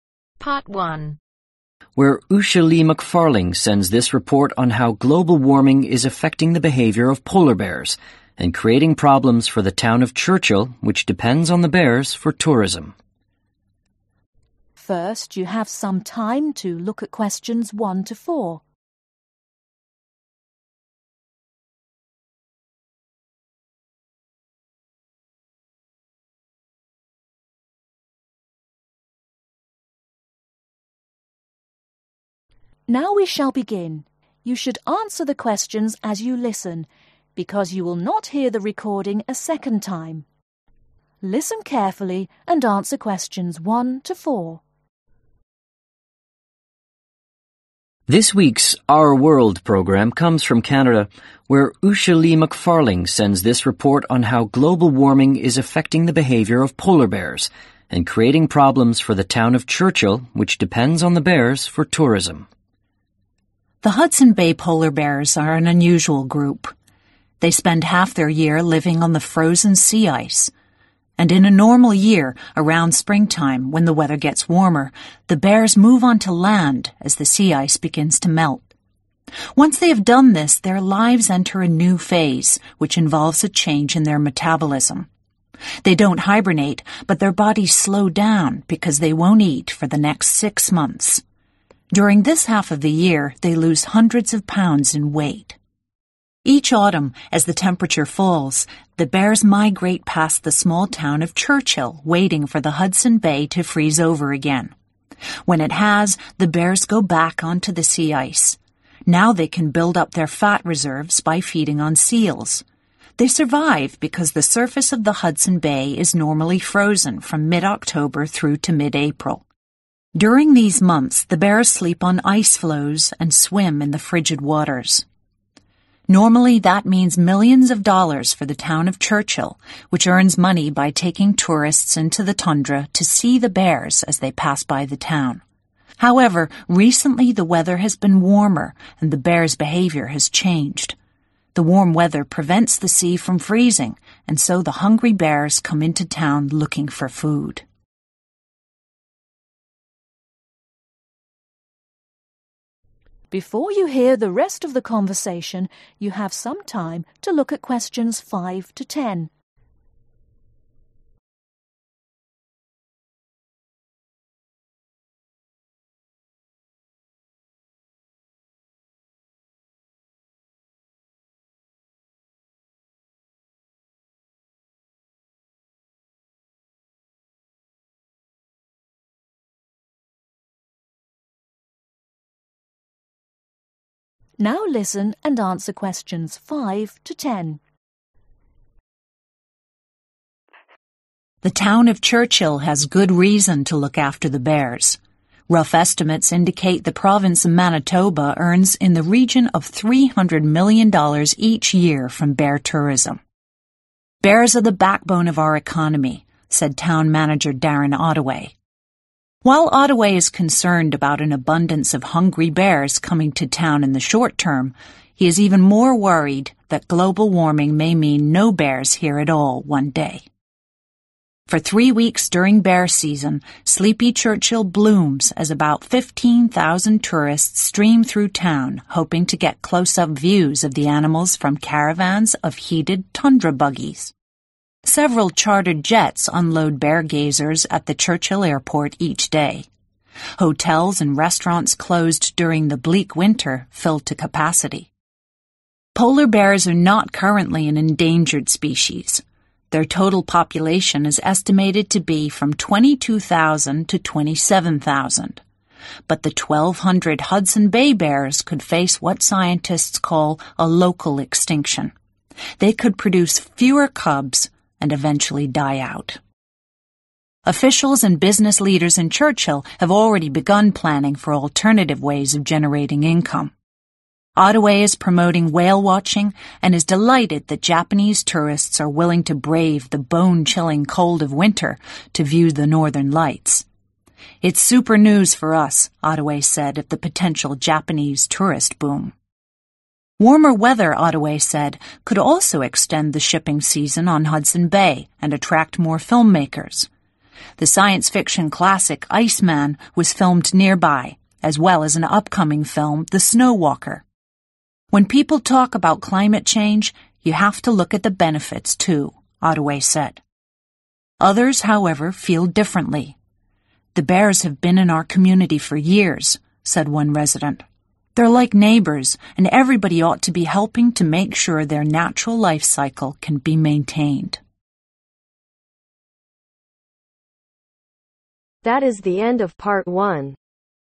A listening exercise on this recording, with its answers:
Complete the notes below. Write NO MORE THAN TWO WORDS AND/OR A NUMBER for each answer.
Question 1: SPRING (1) Move ............. when ice melts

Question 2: no food for (2) ............. months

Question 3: Early AUTUMN (3) ............. past Churchill wait for sea ice to freeze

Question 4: Late AUTUMN Return to sea ice feed on (4) .........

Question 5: How much does Manitoba Province earn in one year from Bear Tourism ?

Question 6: What might cause the bears to disappear according to Darren Ottaway ?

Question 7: What do tourists come to do ?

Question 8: What is the estimated number of Hudson Bay Bears ?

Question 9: What DP Japanese tourists want to see ?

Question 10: Which movie , filmed in Churchill is yet to be released the ?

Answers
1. onto land
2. next six
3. migrate
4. seals
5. $300 million
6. global warming
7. view bears
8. 1200
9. Northern lights
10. Snow walker